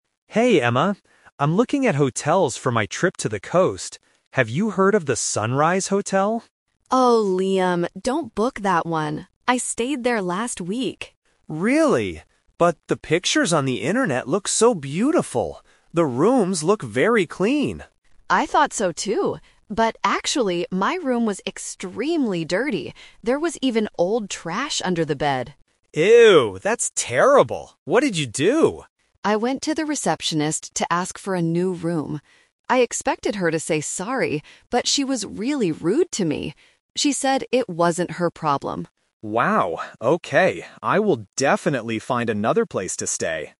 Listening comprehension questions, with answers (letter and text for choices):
Listen to a conversation between two friends about a hotel. Choose the correct answer (A, B, or C) for each question.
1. What did Emma think about the hotel before she arrived?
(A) She thought it was beautiful and clean.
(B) She thought it was extremely dirty.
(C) She thought it was very expensive.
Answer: (A) She thought it was beautiful and clean.

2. What was the actual problem with Emma's room?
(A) It was too small for her.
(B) It had old trash under the bed.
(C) It didn't have a nice view.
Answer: (B) It had old trash under the bed.

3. How did the receptionist react when Emma talked to her?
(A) She said sorry to Emma.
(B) She gave Emma a new room.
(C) She was very rude.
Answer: (C) She was very rude.

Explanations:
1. Liam says the pictures look "beautiful" and "clean", and Emma replies, "I thought so, too!". Option B is the trap: "extremely dirty" is the reality of the hotel, not what Emma thought before she went there. Option C is a plausible expectation for a hotel but is not mentioned.
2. Emma explicitly states, "There was even old trash under the bed!" Option A and Option C are plausible problems for a hotel room, but they are not mentioned in the audio.
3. Emma says, "...she was really rude to me." Option A and Option B are traps: Emma "expected her to say sorry" and she went down "to ask for a new room", but the receptionist didn't do either of those things.

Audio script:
Liam: Hey Emma. I'm looking at hotels for my trip to the coast. Have you heard of the Sunrise Hotel?
Emma: Oh, Liam, don't book that one! I stayed there last week.
Liam: Really? But the pictures on the internet look so beautiful. The rooms look very clean.
Emma: I thought so, too! But actually, my room was extremely dirty. There was even old trash under the bed!
Liam: Ew, that's terrible. What did you do?
Emma: I went to the receptionist to ask for a new room. I expected her to say sorry, but she was really rude to me. She said it wasn't her problem.